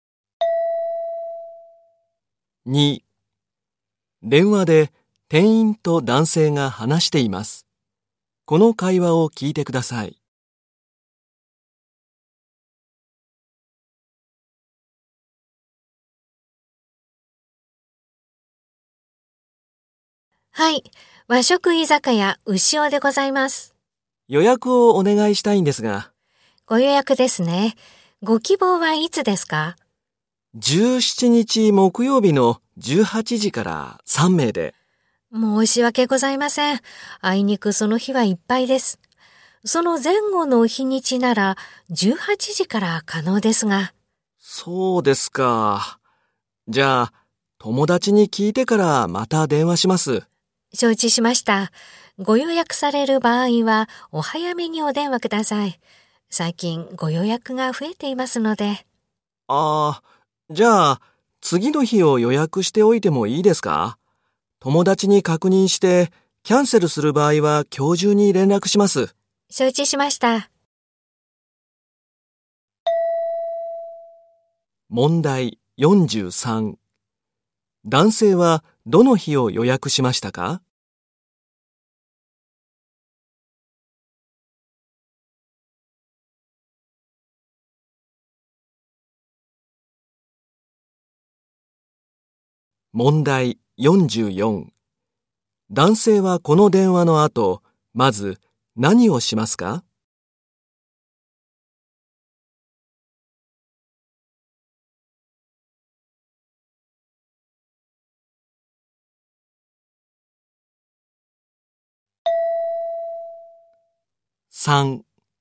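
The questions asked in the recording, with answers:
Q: 男性はどの日を予約しましたか?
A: 18日(金曜日)

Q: 男性はこの電話の後、まず何をしますか?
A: 友達に確認する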